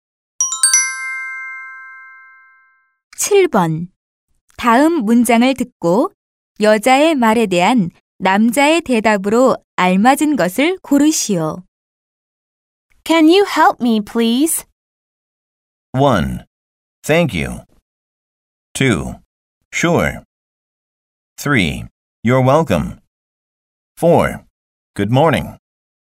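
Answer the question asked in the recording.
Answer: 2: Sure.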